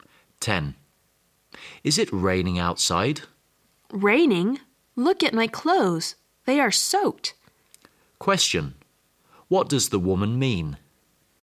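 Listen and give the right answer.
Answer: It is raining heavily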